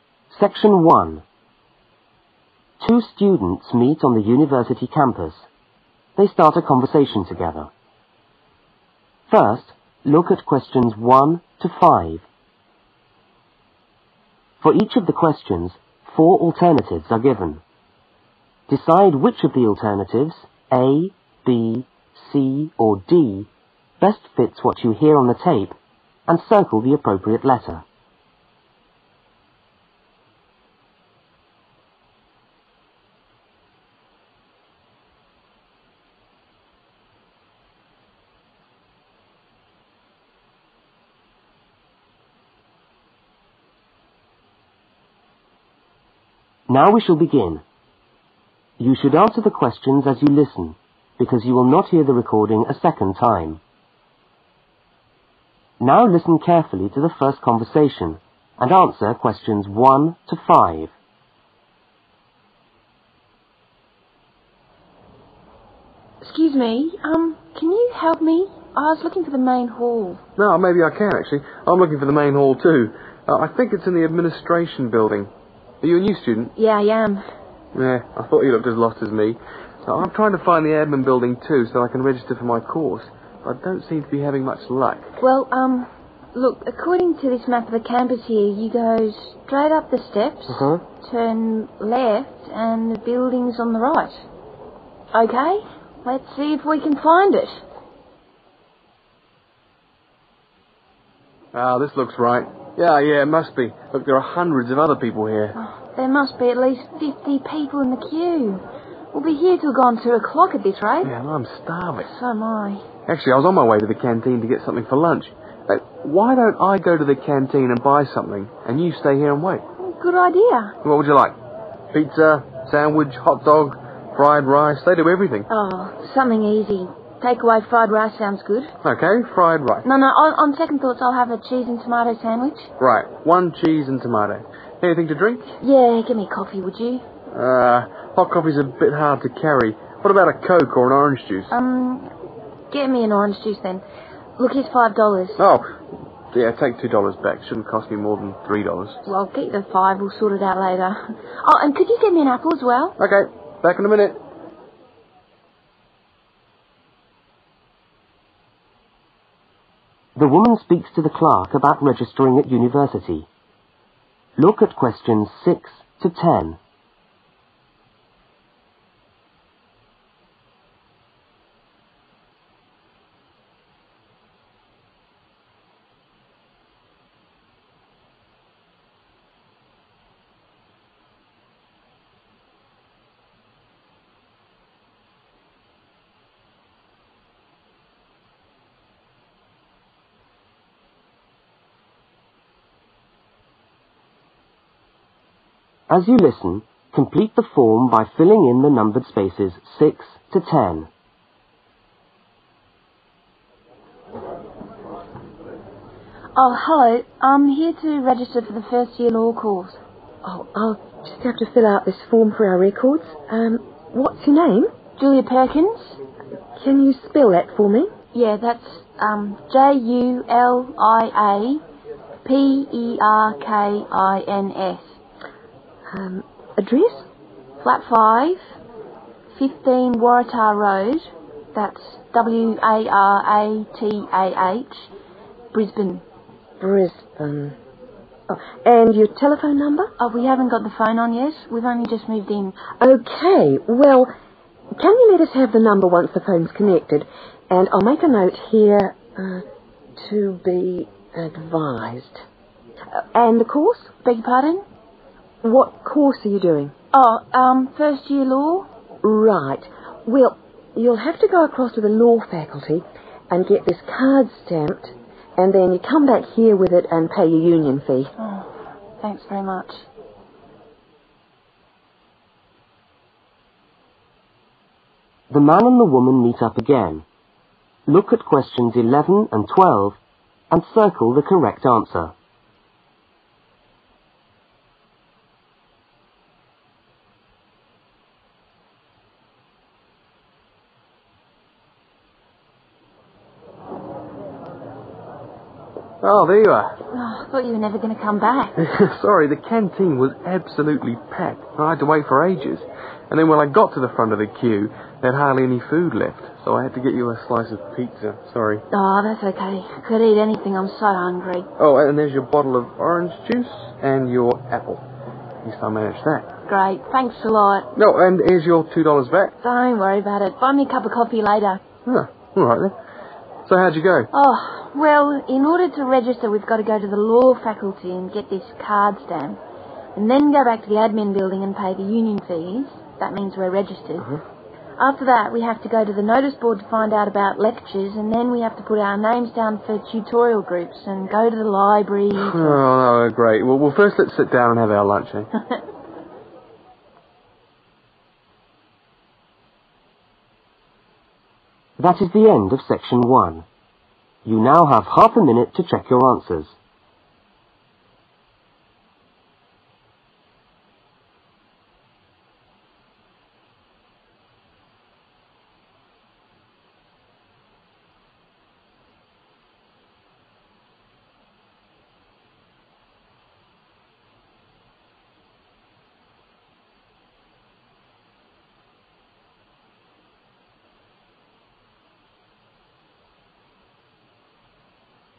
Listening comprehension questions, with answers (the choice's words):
Circle the appropriate letter.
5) How much money does the woman give the man?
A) $2.00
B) $3.00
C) $3.50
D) $5.00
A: $5.00

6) Name of student: (6)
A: Julia Perkins

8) Town: (8)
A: Brisbane

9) Tel: (9)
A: to be advised

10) Course: (10)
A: first year law

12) What must the students do as part of registration at the university?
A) Check the notice board in the Law Faculty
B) Find out about lectures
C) Organise tutorial groups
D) Pay the union fees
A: Pay the union fees